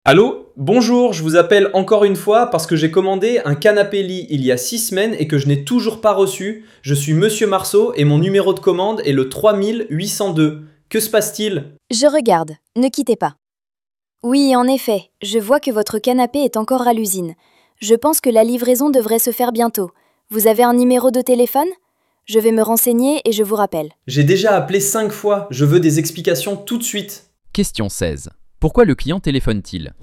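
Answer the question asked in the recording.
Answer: Parce qu'il n'a toujours pas reçu le canapé-lit commandé il y a six semaines.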